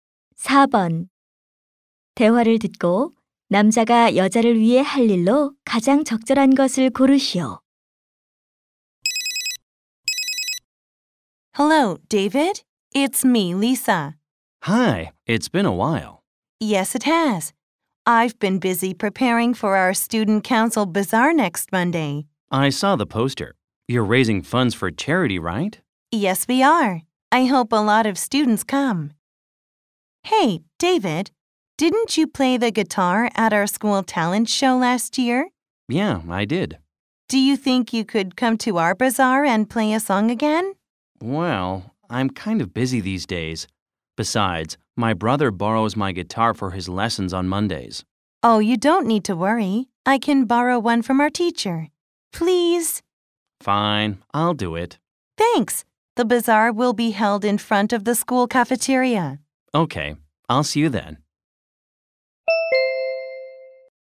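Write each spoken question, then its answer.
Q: 대화를 듣고 남자가 여자를 위해 할 일로 가장 적절한 것을 고르시오.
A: 바자회에서 기타 연주하기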